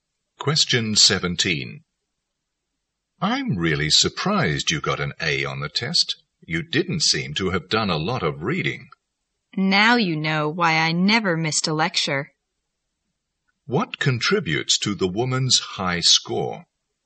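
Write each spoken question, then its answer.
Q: What contributes to the woman's high score?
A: She never missed a lecture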